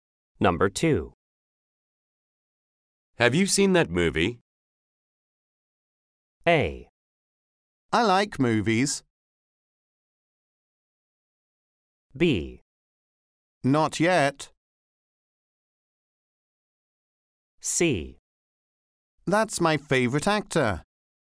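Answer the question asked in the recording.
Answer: B: Not yet.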